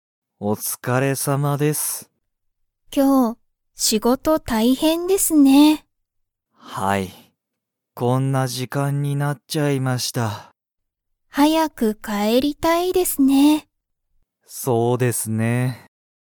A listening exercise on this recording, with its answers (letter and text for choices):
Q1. 山田やまださんは、早はやく帰かえりたいですか?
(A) はい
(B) いいえ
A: (A) はい

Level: Level 1